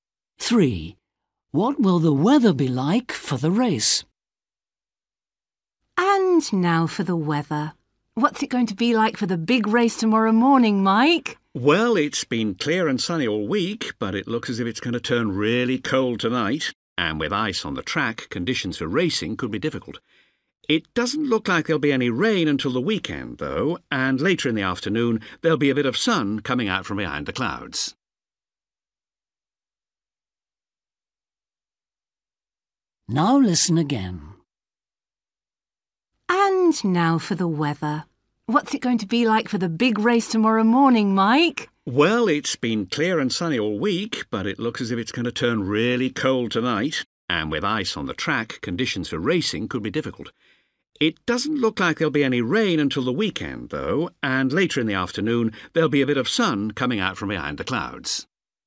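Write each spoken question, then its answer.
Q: What will the weather be like for the race?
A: Very cold and icy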